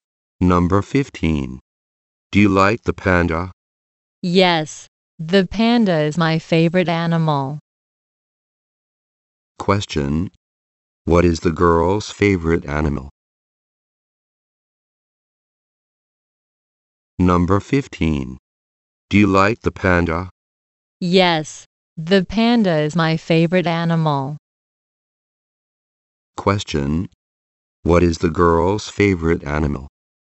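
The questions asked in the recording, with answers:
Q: Question. What is the girl's favorite animal?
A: The panda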